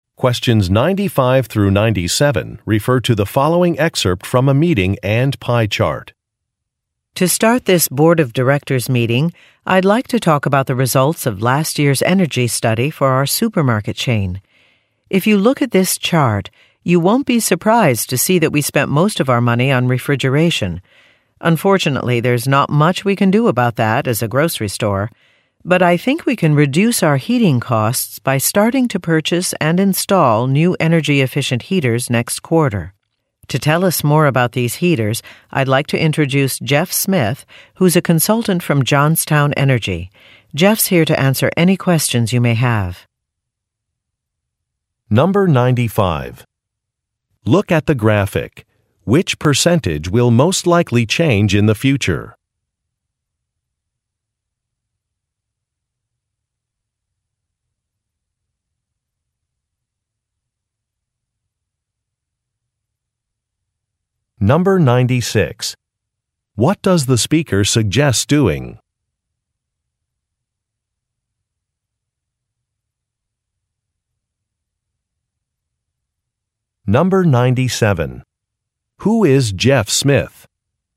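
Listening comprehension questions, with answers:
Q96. What does the speaker suggest doing?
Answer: Upgrading some equipment

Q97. Who is Jeff Smith?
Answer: An energy consultant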